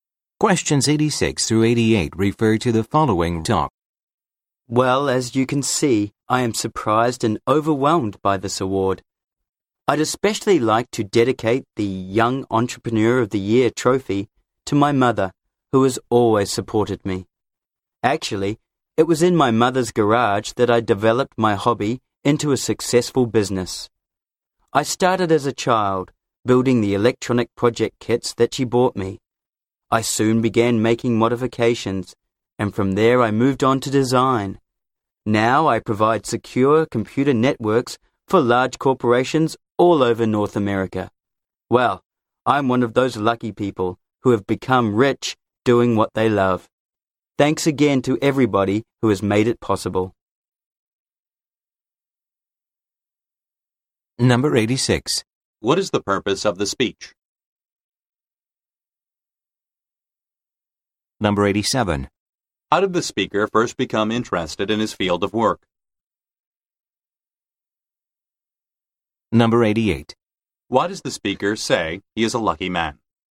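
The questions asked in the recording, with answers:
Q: What is the purpose of the speech?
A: To accept an award

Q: How did the speaker first become interested in his field of work?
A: Building electronic kits his mother bought him as a child

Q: Why does the speaker say he is a lucky man?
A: He became rich doing what he loves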